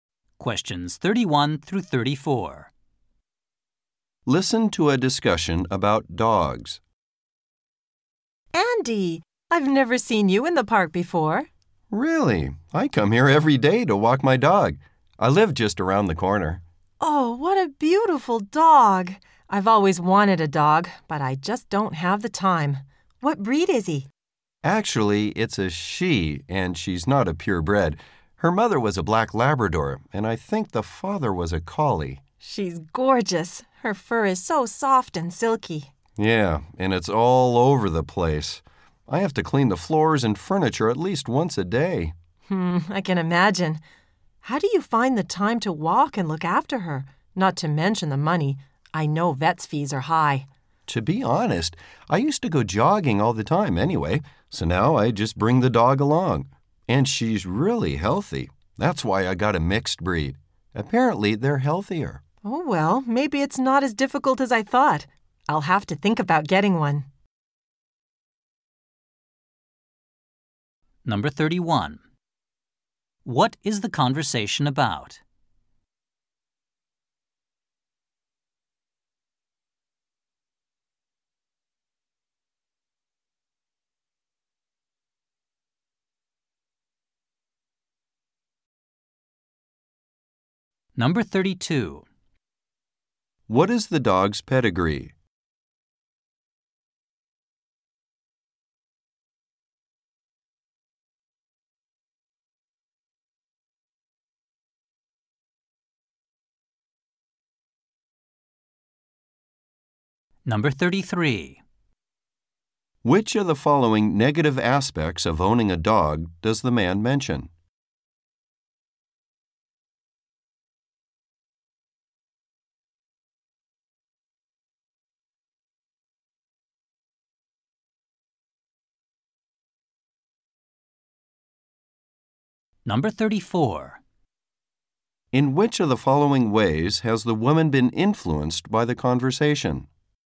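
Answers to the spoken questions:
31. The man's dog and owning a dog
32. A mixed breed: black Labrador mother and probably collie father
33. Her fur gets everywhere, so he has to clean every day
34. She will think about getting a dog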